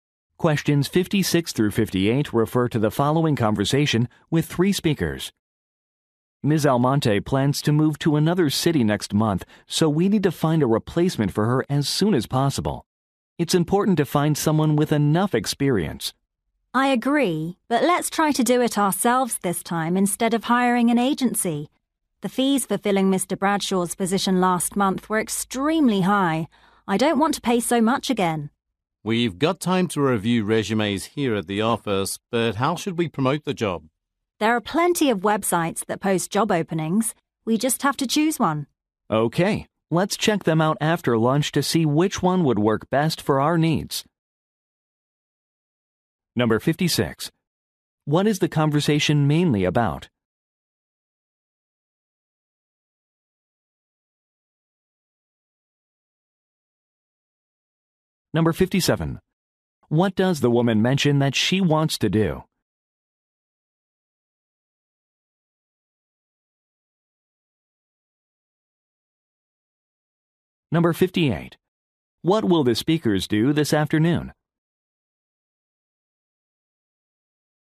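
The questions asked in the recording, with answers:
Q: What is the conversation mainly about?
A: Finding a replacement employee

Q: What will the speakers do this afternoon?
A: Look at job posting websites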